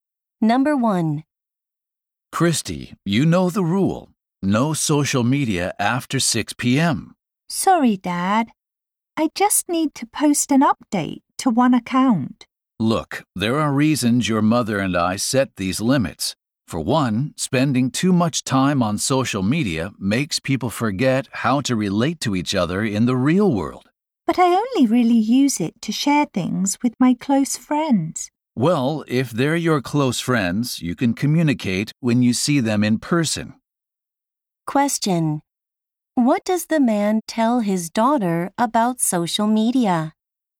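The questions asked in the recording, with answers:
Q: What does the man tell his daughter about social media?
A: Using it too much makes people forget how to relate to each other in the real world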